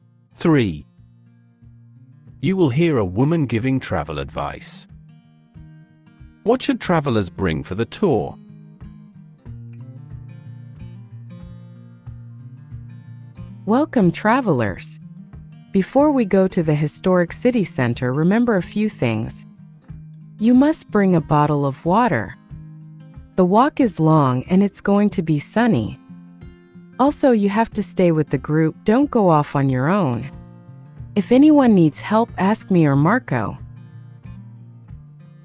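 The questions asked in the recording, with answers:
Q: What should travelers bring for the tour?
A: A bottle of water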